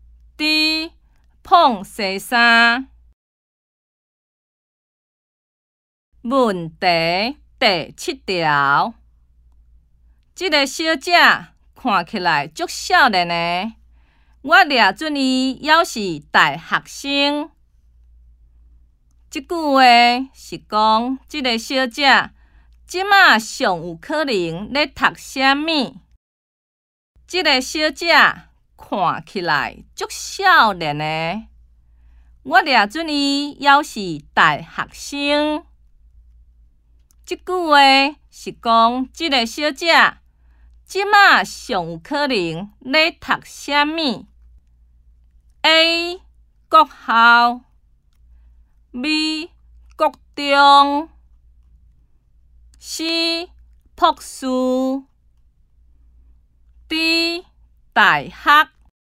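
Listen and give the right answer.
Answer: D: 大学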